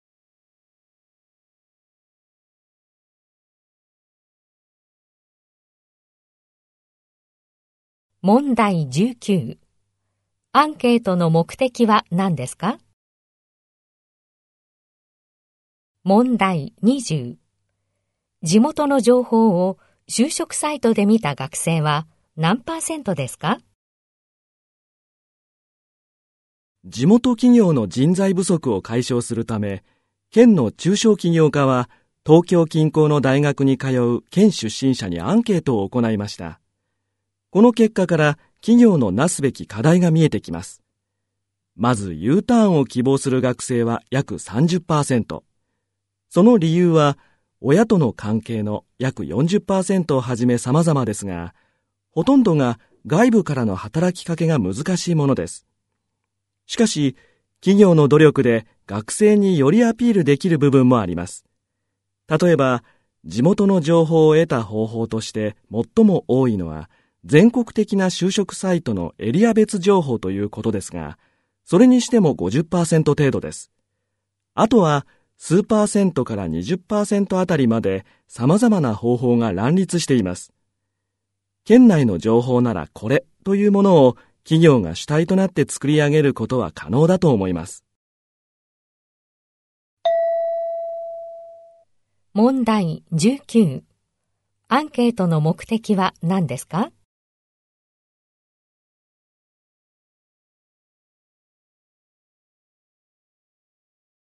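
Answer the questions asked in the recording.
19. 地元企業の人材不足を解消するため
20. 50%程度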